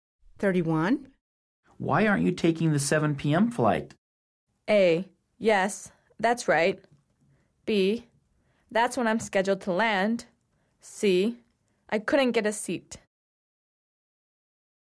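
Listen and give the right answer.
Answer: C: I couldn't get a seat.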